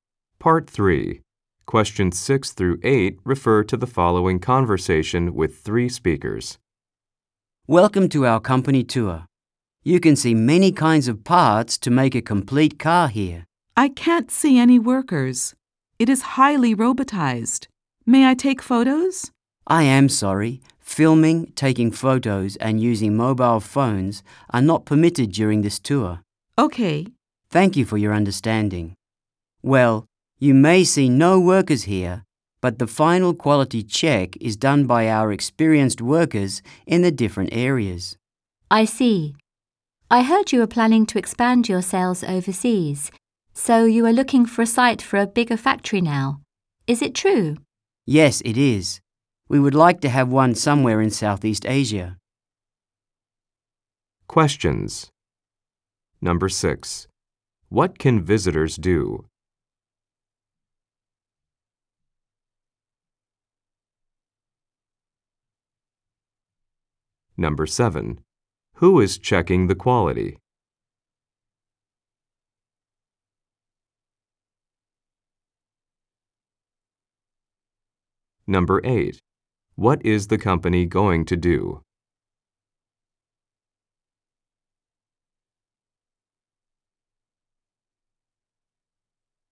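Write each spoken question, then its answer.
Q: Who is checking the quality?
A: Experienced workers

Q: What is the company going to do?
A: Build a bigger factory in Southeast Asia to expand overseas sales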